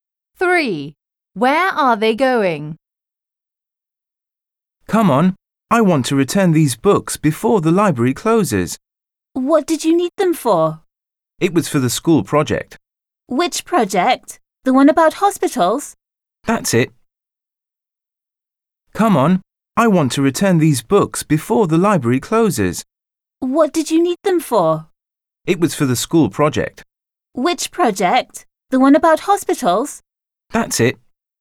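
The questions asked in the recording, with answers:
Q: Where are they going?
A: To the library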